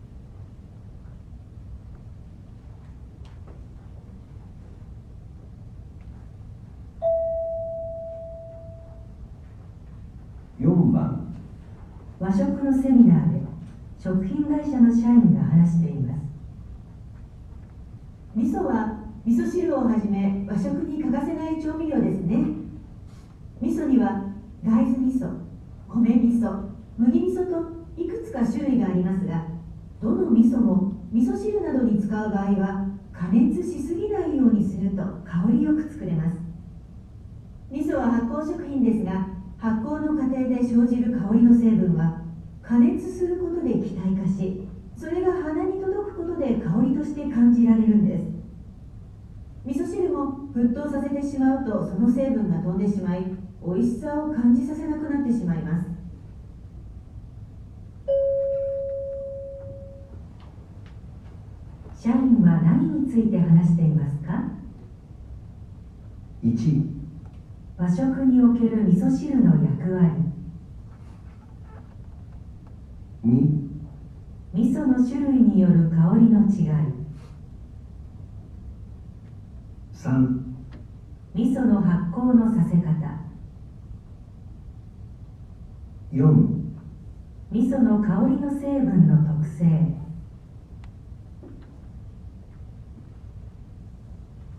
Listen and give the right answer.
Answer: 4

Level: N1 Listening · Test 2